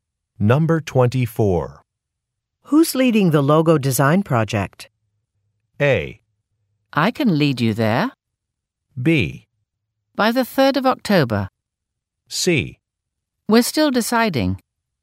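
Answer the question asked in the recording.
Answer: C: We're still deciding.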